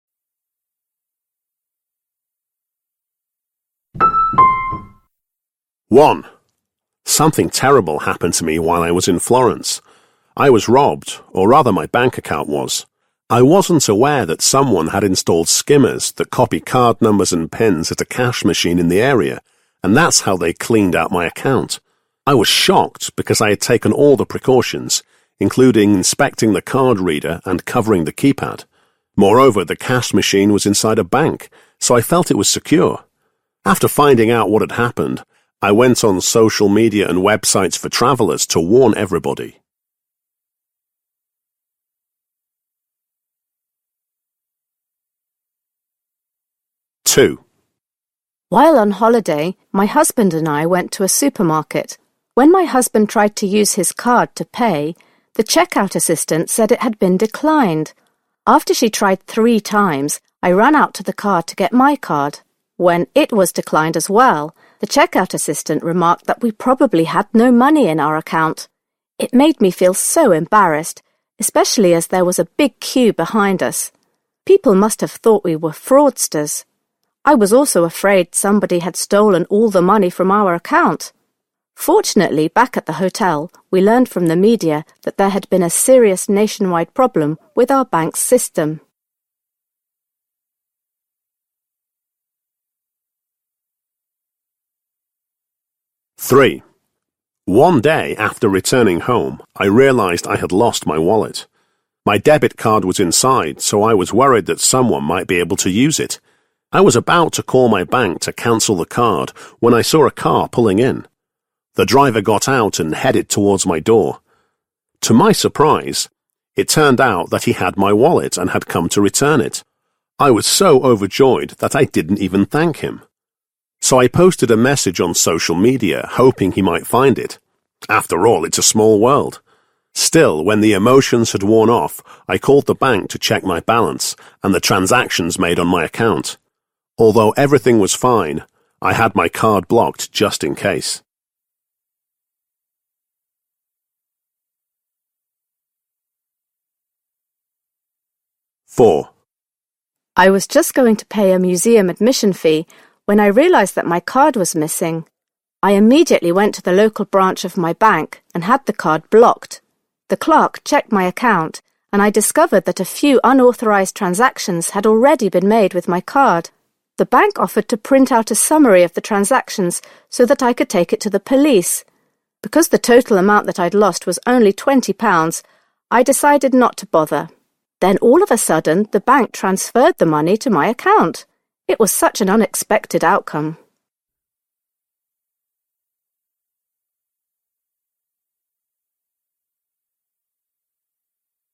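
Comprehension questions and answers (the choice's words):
Wysłuchaj dwukrotnie czterech wypowiedzi związanych z kartami płatniczymi. Do każdej wypowiedzi (2.1.–2.4.) dopasuj odpowiadające jej zdanie (A–E). Wpisz rozwiązania obok wypowiedzi.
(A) was surprised to receive a refund of the money which had been stolen.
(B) publicised some information regarding the theft of money.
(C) had to face embarrassing comments on social media.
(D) took action despite a positive outcome.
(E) felt awkward because of a comment someone made.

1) 2.1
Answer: publicised some information regarding the theft of money.

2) 2.2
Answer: felt awkward because of a comment someone made.

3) 2.3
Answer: took action despite a positive outcome.

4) 2.4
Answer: was surprised to receive a refund of the money which had been stolen.

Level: matura rozszerzona 2022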